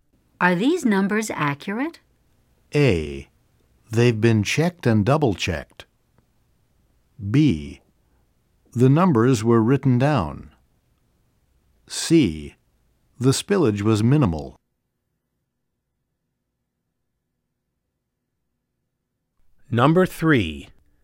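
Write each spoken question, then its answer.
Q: Are these numbers accurate?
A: A: They've been checked and double-checked.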